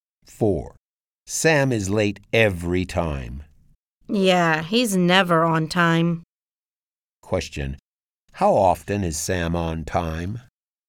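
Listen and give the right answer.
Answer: Never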